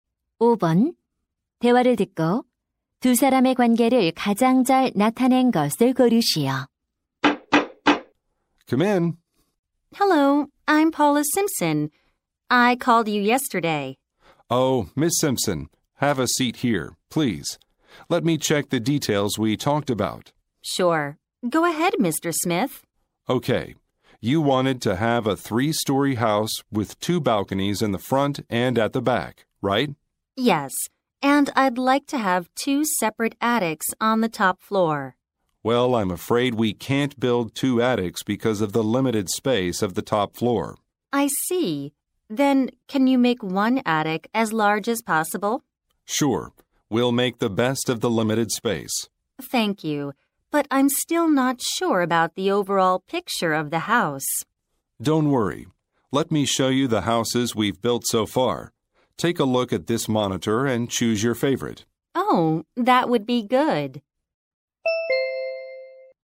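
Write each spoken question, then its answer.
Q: 대화를 듣고 두 사람의 관계를 가장 잘 나타낸 것을 고르시오.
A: 건축 의뢰인 - 건축업자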